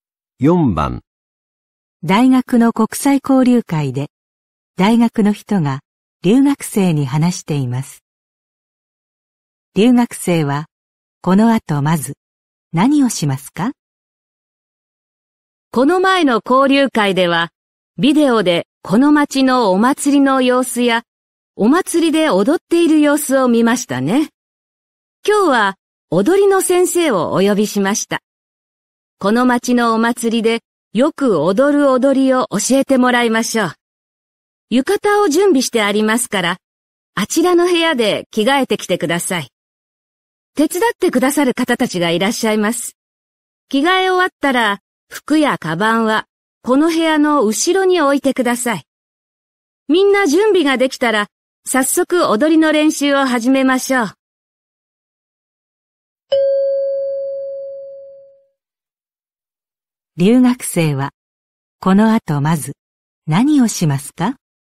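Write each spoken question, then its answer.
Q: 留学生はこの後まず何をしますか?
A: 浴衣に着替える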